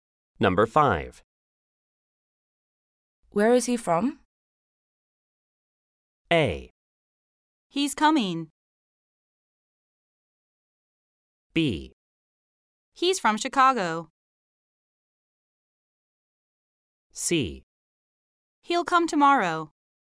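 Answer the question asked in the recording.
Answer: B: He's from Chicago.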